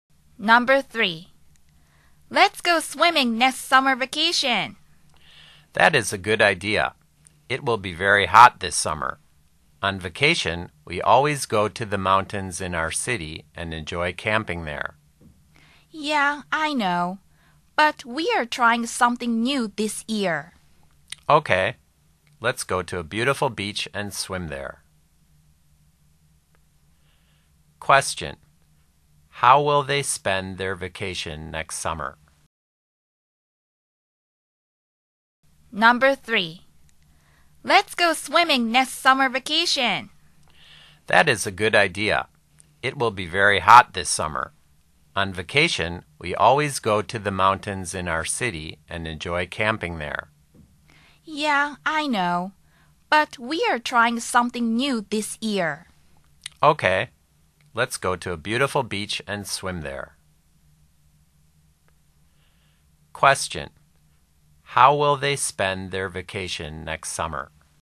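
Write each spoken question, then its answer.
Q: How will they spend their vacation next summer?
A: They will go to a beach and swim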